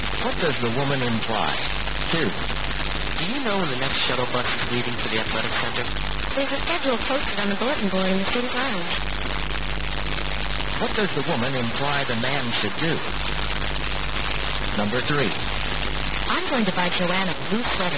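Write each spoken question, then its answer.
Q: What does the woman imply the man should do?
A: Check the schedule on the bulletin board in the student lounge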